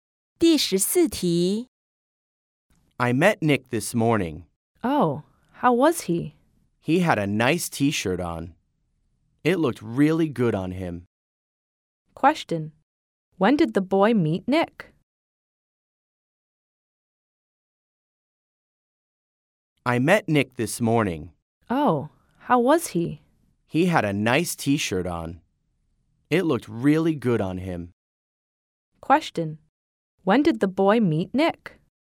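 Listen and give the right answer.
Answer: This morning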